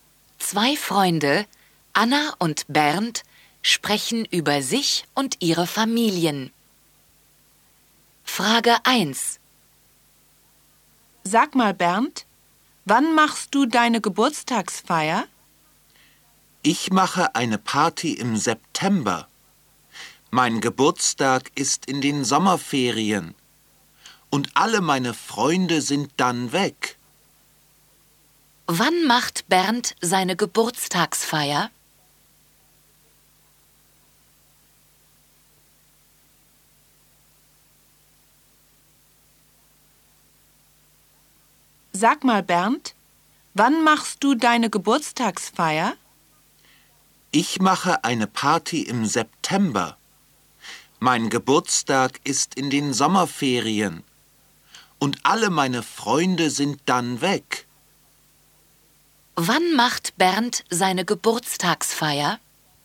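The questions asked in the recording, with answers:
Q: Wann macht Bernd seine Geburtstagsfeier?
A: Im September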